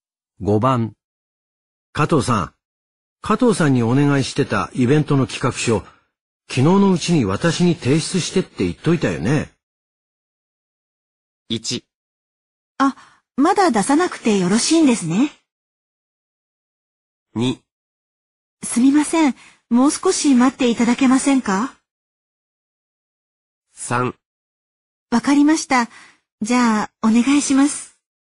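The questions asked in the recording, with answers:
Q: 加藤さんにお願いしてたイベントの企画書、昨日のうちに私に提出してって言っといたよね。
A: 2: すみません、もう少し待っていただけませんか?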